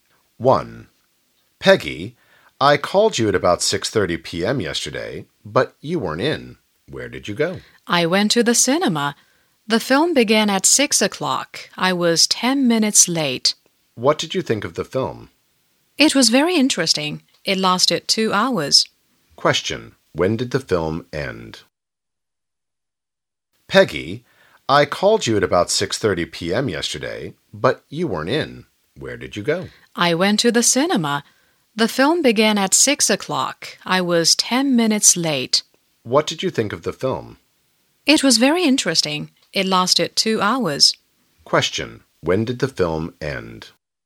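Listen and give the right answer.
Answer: At 8 o'clock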